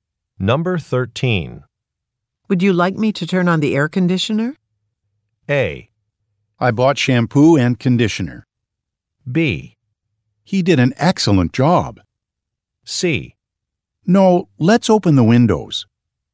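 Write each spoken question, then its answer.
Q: Would you like me to turn on the air conditioner?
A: C: No, let's open the windows.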